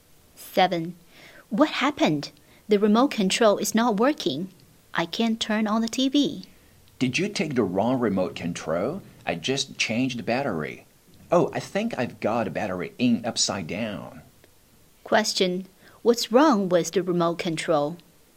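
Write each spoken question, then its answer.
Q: What's wrong with the remote control?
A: The battery was put in upside down.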